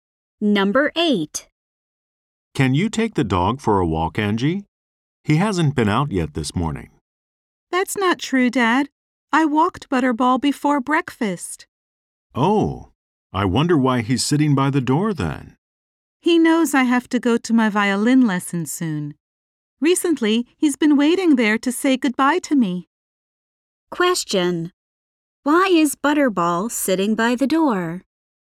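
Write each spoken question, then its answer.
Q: Why is Butterball sitting by the door?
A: He is waiting to say goodbye to Angie before her violin lesson.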